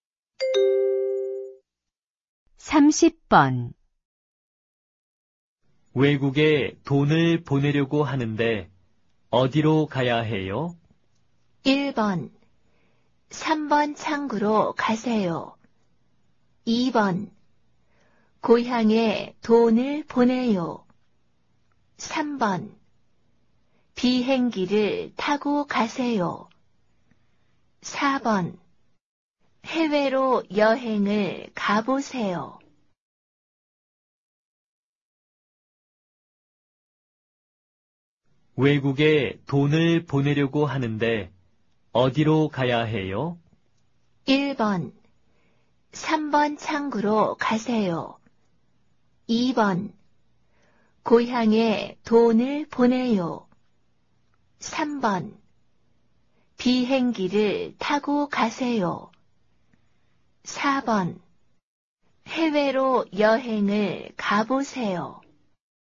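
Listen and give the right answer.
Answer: 1: 3번 창구로 가세요.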